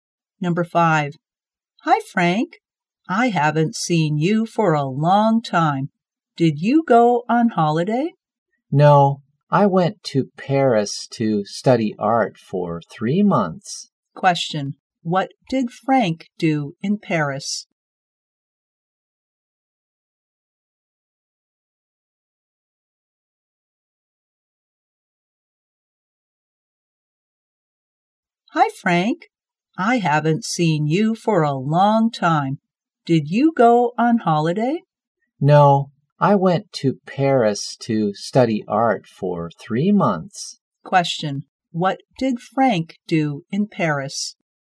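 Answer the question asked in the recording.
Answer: Studied art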